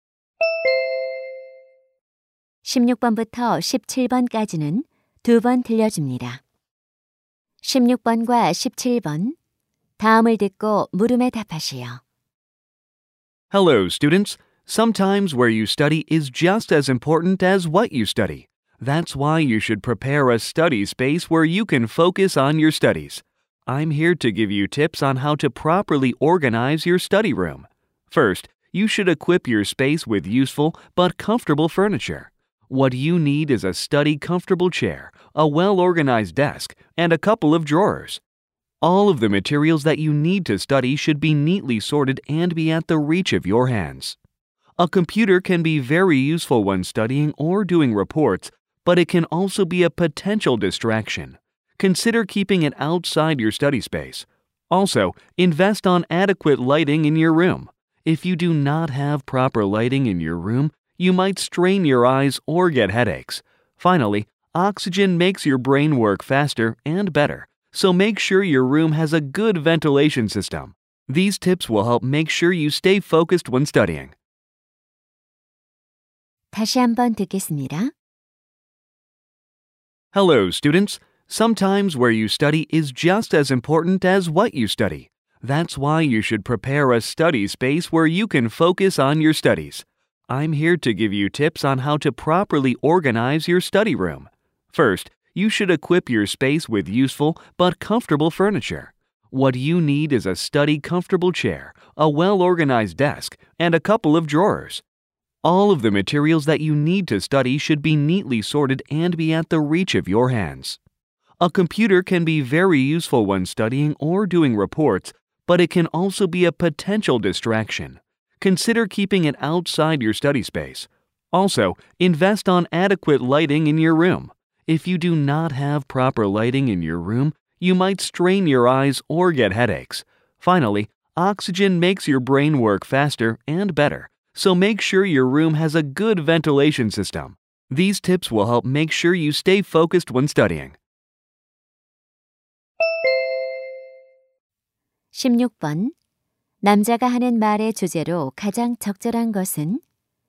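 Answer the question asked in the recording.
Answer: 공부방을 잘 꾸미는 방법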